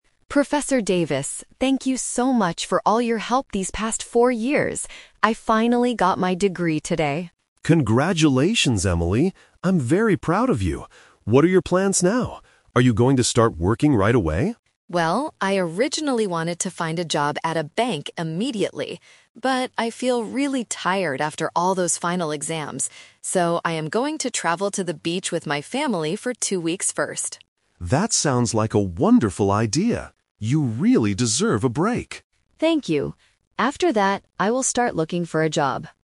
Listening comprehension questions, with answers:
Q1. Why is Emily talking to Professor Davis?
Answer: To thank him on her graduation day.

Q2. What is Emily going to do first?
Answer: She is going to take a vacation.

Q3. What does Professor Davis think about Emily's plan?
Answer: He thinks she needs to rest.

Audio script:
Emily: Professor Davis, thank you so much for all your help these past four years. I finally got my degree today!
Professor Davis: Congratulations, Emily! I'm very proud of you. What are your plans now? Are you going to start working right away?
Emily: Well, I originally wanted to find a job at a bank immediately. But, I feel really tired after all those final exams. So, I am going to travel to the beach with my family for two weeks first.
Professor Davis: That sounds like a wonderful idea. You really deserve a break.